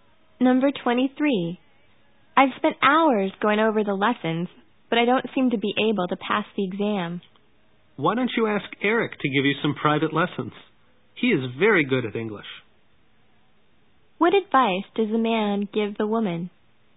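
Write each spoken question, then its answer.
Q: What advice does the man give the woman?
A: Ask Eric for private lessons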